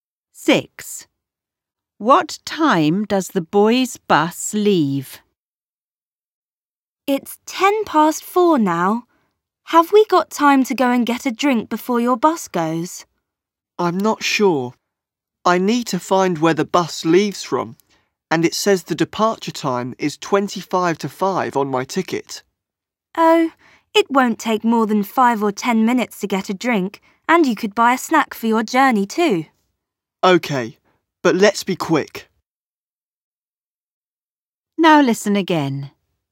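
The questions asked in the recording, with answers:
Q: What time does the boys' bus leave?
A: 4:25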